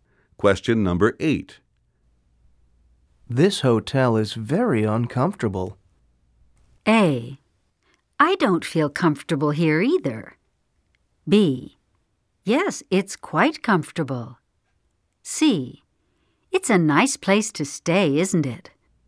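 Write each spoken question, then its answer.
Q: This hotel is very uncomfortable.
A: A: I don't feel comfortable here either.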